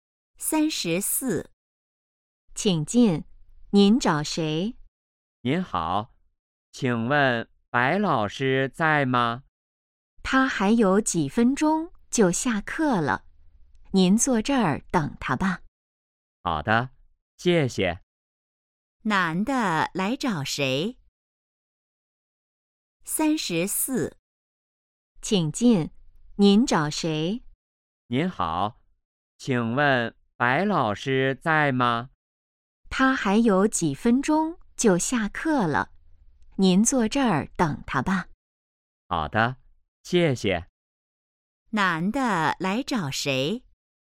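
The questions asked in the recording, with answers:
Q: 男的来找谁?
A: 白老师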